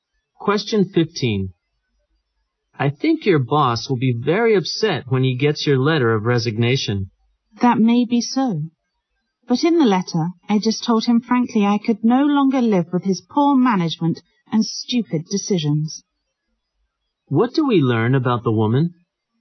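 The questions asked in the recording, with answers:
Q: What do we learn about the woman?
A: She has resigned and frankly criticized her boss's management.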